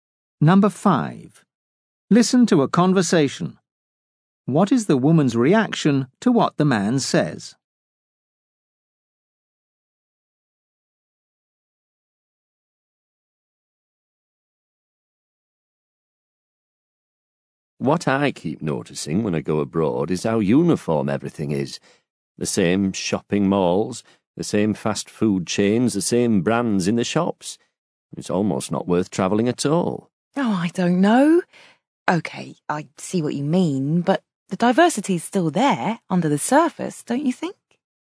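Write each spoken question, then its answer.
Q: What is the woman's reaction to what the man says?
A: She partly agrees but thinks diversity still exists beneath the surface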